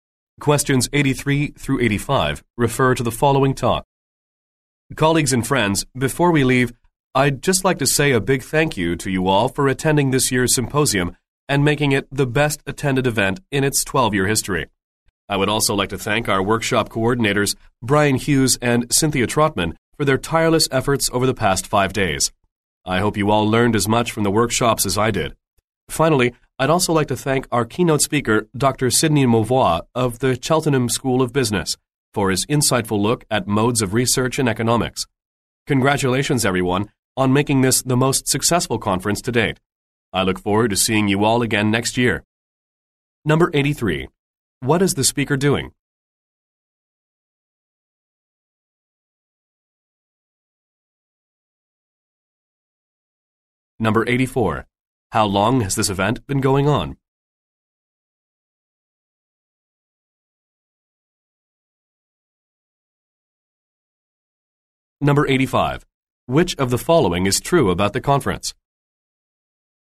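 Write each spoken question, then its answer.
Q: What is the speaker doing?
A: Closing the symposium and thanking people

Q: How long has this event been going on?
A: 12 years

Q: Which of the following is true about the conference?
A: It was the best attended and most successful so far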